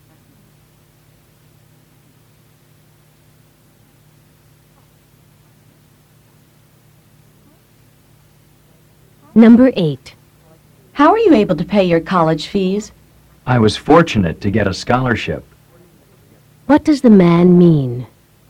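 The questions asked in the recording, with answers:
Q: What does the man mean?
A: A scholarship pays his college fees.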